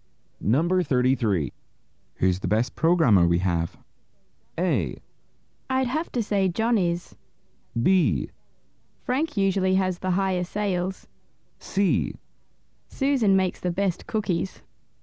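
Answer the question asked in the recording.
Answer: A: I'd have to say John is.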